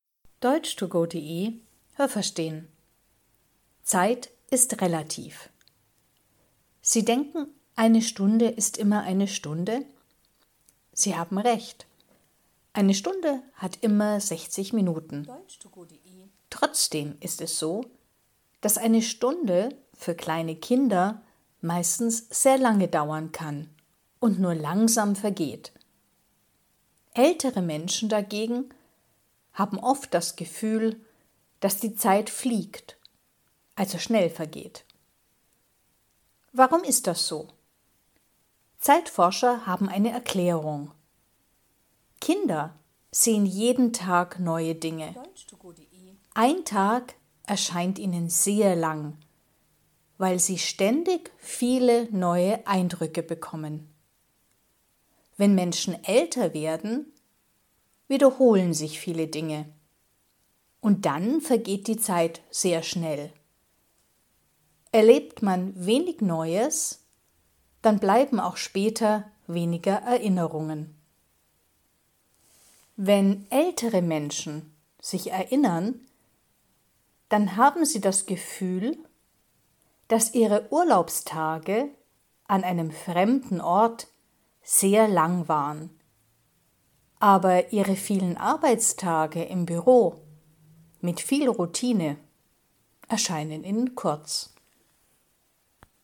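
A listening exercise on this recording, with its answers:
Was haben Sie gehört? Es gibt nur eine korrekte Antwort.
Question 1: Für Kinder vergeht die Zeit _____ als für ältere Menschen.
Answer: langsamer

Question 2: _____ bekommen jeden Tag viele neue Eindrücke.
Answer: Kinder

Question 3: Wenn man wenig Neues erlebt, dann hat man _____ Erinnerungen.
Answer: weniger

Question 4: Wenn ältere Menschen sich erinnern, dann haben sie das Gefühl, ihre Urlaubstage an einem fremden Ort waren _____ .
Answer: sehr lang

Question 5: Wenn ältere Menschen sich erinnern, dann erscheinen ihre vielen Arbeitstage im Büro _____ .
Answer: kurz

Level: A (einfach)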